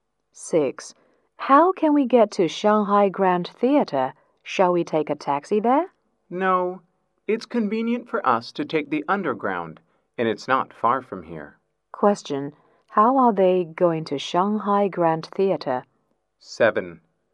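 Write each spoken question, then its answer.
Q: Question: How are they going to Shanghai Grand Theater?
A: By underground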